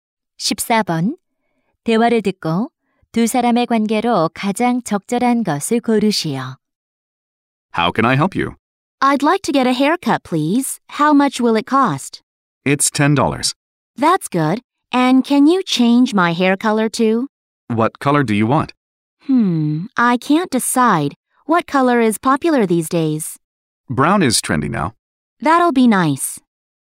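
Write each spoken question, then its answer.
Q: 대화를 듣고 두 사람의 관계로 가장 적절한 것을 고르시오.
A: 미용사와 손님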